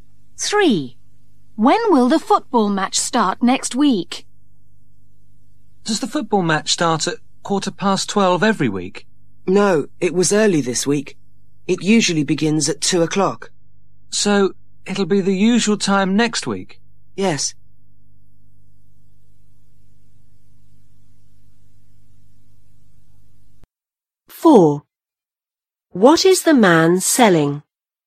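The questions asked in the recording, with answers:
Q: When will the football match start next week?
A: at 2:00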